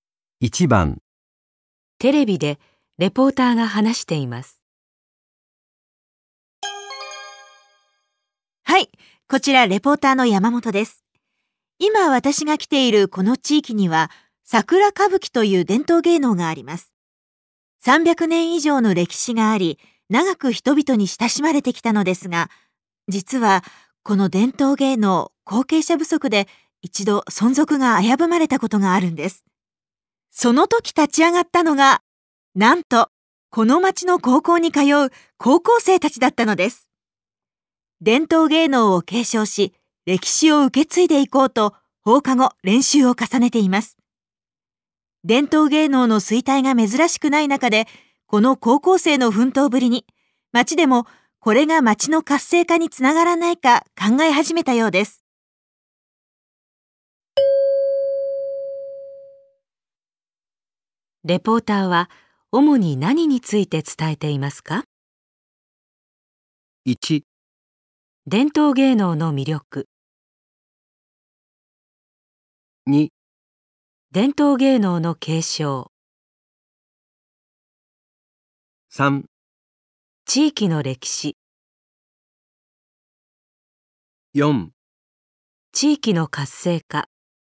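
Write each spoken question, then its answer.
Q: レポーターは主に何について伝えていますか?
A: 2: 伝統芸能の継承。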